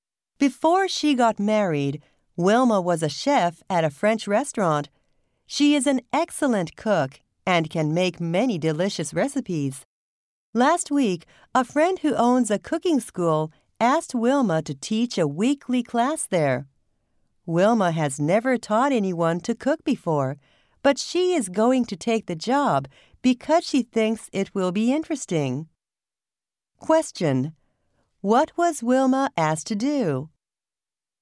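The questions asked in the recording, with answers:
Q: What was Wilma asked to do?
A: Teach a weekly cooking class.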